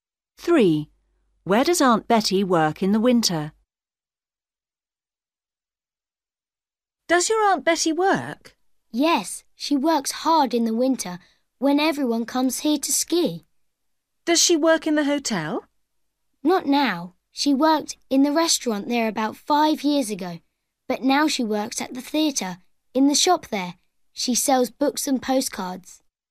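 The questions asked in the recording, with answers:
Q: Where does Aunt Betty work in the winter?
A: In the theatre shop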